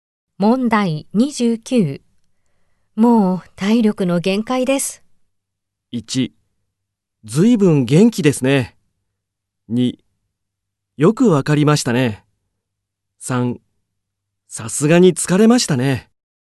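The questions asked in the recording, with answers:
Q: もう体力の限界です。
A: 3: さすがに疲れましたね。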